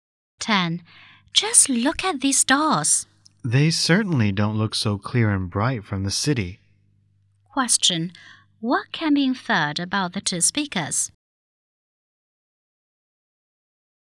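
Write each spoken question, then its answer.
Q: What can be inferred about the two speakers?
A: They are in the countryside, away from the city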